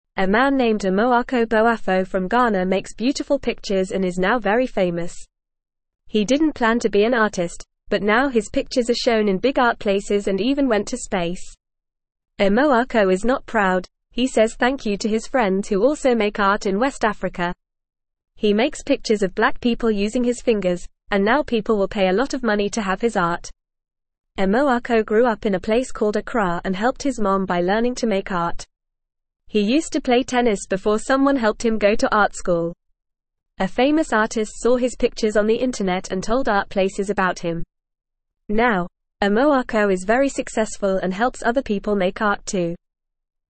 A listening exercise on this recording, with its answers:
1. A man named Amoako Boafo from Ghana makes beautiful pictures and is now very (1)______.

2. He didn't plan to be an (2)______, but now his pictures are shown in big art places and even went to space!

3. Amoako is not proud; he says thank you to his friends who also make art in (3)______ Africa.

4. He (4)______ pictures of black people using his fingers, and now people will pay a lot of money to have his art.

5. Amoako grew up in a place (5)______ Accra and helped his mom by learning to make art.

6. He used to (6)______ tennis before someone helped him go to art (7)______.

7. He used to (6)______ tennis before someone helped him go to art (7)______.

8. A famous artist saw his pictures on the (8)______ and told art places about him.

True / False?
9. Amoako Boafo is a woman from Ghana who makes beautiful pictures.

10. He used to play soccer before someone helped him go to art school.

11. His pictures are shown in big art places and even went to space.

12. People are willing to pay a lot of money to have his art.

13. Amoako grew up in a place called Kumasi and learned to make art from his dad.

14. Amoako is thankful to his friends who also make art in West Africa.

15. He didn't plan to be an artist, but now he is very famous.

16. He makes pictures of white people using his fingers.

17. Where is Amoako Boafo from?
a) France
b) China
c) Ghana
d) Brazil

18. Where are Amoako Boafo's pictures shown?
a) Schools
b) Parks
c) Restaurants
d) Big art places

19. What did Amoako Boafo learn to make to help his mom?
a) Music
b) Food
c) Clothes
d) Art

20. What did Amoako Boafo use to make his pictures?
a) A paintbrush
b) His fingers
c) A pencil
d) A computer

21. What did Amoako Boafo used to play before he became an artist?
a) Soccer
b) Basketball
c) Tennis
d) Baseball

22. Who helped Amoako Boafo go to art school?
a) Someone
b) His mom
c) His friend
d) His teacher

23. What did a famous artist do after seeing Amoako Boafo's pictures on the internet?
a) Told his mom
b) Told art places about him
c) Bought his pictures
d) Played tennis with him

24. Where is Amoako from?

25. How does Amoako make his pictures?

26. What sport did Amoako play before he went to art school?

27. Who helped Amoako become famous?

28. What do people do with a lot of money for Amoako's art?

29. What does Amoako do for other people now that he is successful?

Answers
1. famous
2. artist
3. West
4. makes
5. called
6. play
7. school
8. internet
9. False
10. False
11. True
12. True
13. False
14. True
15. True
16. False
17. c
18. d
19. d
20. b
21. c
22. a
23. b
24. Amoako is from a place called Accra in Ghana.
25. Amoako makes his pictures using his fingers.
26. Amoako played tennis before he went to art school.
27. A famous artist who saw his pictures on the internet helped Amoako become famous.
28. People pay a lot of money to have Amoako's art.
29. Now that he is successful, Amoako helps other people make art too.

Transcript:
A man named Amoako Boafo from Ghana makes beautiful pictures and is now very famous. He didn't plan to be an artist, but now his pictures are shown in big art places and even went to space! Amoako is not proud; he says thank you to his friends who also make art in West Africa. He makes pictures of black people using his fingers, and now people will pay a lot of money to have his art.
Amoako grew up in a place called Accra and helped his mom by learning to make art. He used to play tennis before someone helped him go to art school. A famous artist saw his pictures on the internet and told art places about him. Now, Amoako is very successful and helps other people make art too.

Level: Level 1

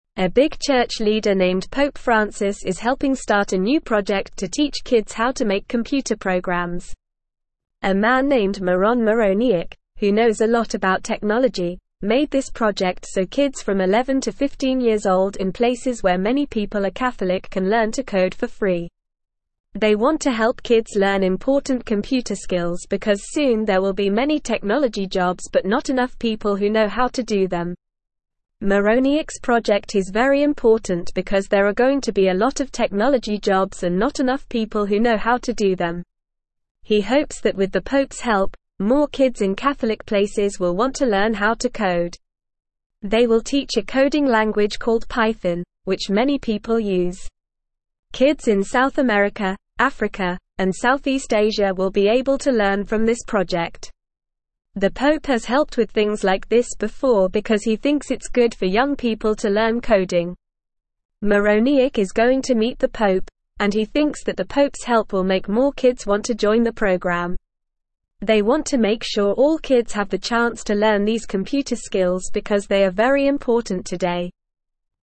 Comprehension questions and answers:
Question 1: Who is helping to start the project to teach kids how to make computer programs?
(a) Bill Gates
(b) Mark Zuckerberg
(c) Pope Francis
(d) Steve Jobs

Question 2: What age group is the project aiming to teach how to code?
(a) 5 to 10 years old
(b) 11 to 15 years old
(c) 16 to 20 years old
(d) 21 to 25 years old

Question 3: What coding language will the kids learn in the project?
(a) Spanish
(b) French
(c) Python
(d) Chinese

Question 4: In which continents will kids be able to learn from this project?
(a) South America, Africa, and Southeast Asia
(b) Europe, North America, and Australia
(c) Asia, Europe, and Africa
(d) South America, North America, and Europe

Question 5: Why is Mironiuk's project important?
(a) There will be many farming jobs but not enough people who know how to do them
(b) There will be many sports jobs but not enough people who know how to do them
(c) There will be many cooking jobs but not enough people who know how to do them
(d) There will be many technology jobs but not enough people who know how to do them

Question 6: What does Mironiuk hope the Pope's help will do for the project?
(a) Make more adults want to join the program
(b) Make more kids want to play sports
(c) Make more kids want to learn how to cook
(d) Make more kids want to join the program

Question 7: Why does the Pope think it's good for young people to learn coding?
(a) Because it's not important for today's world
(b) Because it's important for today's world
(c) Because it's only for boys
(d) Because it's only for girls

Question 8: What is the main goal of the project?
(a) To make sure all kids have the chance to learn important computer skills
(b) To make sure all kids have the chance to learn how to cook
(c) To make sure all kids have the chance to learn how to play sports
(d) To make sure all kids have the chance to learn how to paint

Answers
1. c
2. b
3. c
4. a
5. d
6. d
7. b
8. a

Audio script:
A big church leader named Pope Francis is helping start a new project to teach kids how to make computer programs. A man named Miron Mironiuk, who knows a lot about technology, made this project so kids from 11 to 15 years old in places where many people are Catholic can learn to code for free. They want to help kids learn important computer skills because soon there will be many technology jobs but not enough people who know how to do them.
Mironiuk's project is very important because there are going to be a lot of technology jobs and not enough people who know how to do them. He hopes that with the Pope's help, more kids in Catholic places will want to learn how to code. They will teach a coding language called Python, which many people use. Kids in South America, Africa, and Southeast Asia will be able to learn from this project.
The Pope has helped with things like this before because he thinks it's good for young people to learn coding. Mironiuk is going to meet the Pope, and he thinks that the Pope's help will make more kids want to join the program. They want to make sure all kids have the chance to learn these computer skills because they are very important today.

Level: Level 2

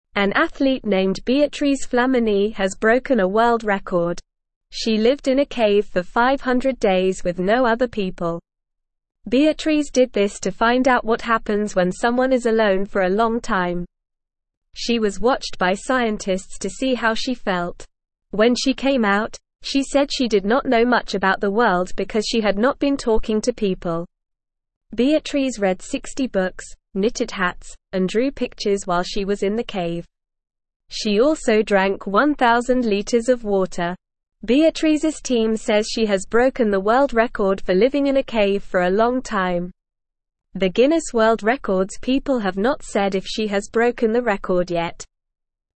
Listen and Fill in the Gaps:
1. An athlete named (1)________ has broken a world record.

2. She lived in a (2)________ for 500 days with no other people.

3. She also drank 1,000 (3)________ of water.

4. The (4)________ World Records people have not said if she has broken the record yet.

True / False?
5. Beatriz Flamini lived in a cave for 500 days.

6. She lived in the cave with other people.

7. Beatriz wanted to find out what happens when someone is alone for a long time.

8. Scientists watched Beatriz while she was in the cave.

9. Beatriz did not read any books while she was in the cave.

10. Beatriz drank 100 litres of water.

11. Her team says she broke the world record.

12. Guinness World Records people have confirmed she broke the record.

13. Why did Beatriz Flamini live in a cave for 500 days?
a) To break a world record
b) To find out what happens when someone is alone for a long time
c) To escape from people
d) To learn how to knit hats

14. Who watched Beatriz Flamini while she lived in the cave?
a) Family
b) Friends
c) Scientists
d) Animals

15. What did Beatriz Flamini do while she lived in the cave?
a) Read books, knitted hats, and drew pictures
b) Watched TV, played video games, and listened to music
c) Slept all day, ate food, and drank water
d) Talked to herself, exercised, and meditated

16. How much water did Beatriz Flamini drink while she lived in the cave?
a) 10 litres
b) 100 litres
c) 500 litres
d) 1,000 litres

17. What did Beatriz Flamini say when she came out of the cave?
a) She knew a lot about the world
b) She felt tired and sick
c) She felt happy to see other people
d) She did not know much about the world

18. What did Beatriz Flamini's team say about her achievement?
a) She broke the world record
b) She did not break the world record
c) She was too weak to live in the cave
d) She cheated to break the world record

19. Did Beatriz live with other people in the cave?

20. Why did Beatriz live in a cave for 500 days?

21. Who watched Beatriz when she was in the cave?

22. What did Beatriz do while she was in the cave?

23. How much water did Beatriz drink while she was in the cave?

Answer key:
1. Beatriz Flamini
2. cave
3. litres
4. Guinness
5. True
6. False
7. True
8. True
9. False
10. False
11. True
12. False
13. b
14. c
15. a
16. d
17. d
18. a
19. No, Beatriz did not live with other people in the cave.
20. Beatriz lived in a cave for 500 days to find out what happens when someone is alone for a long time.
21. Scientists watched Beatriz when she was in the cave.
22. While she was in the cave, Beatriz read 60 books, knitted hats, and drew pictures.
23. Beatriz drank 1,000 liters of water while she was in the cave.

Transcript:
An athlete named Beatriz Flamini has broken a world record. She lived in a cave for 500 days with no other people. Beatriz did this to find out what happens when someone is alone for a long time. She was watched by scientists to see how she felt. When she came out, she said she did not know much about the world because she had not been talking to people. Beatriz read 60 books, knitted hats, and drew pictures while she was in the cave. She also drank 1,000 litres of water. Beatriz's team says she has broken the world record for living in a cave for a long time. The Guinness World Records people have not said if she has broken the record yet.

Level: Level 1

